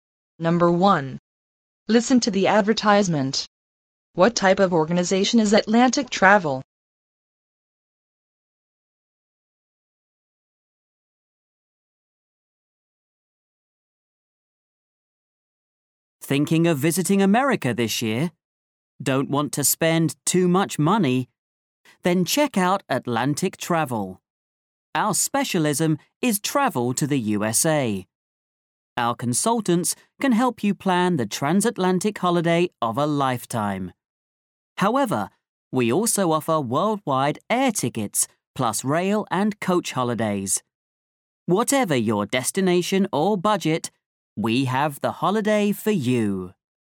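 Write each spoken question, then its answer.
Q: What type of organization is Atlantic Travel?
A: A travel agency specialising in travel to the USA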